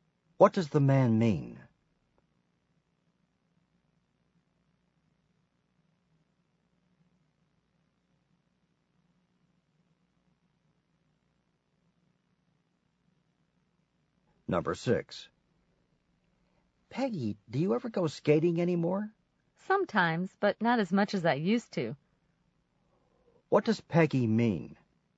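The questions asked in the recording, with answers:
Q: What does Peggy mean?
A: She skates less often than she used to.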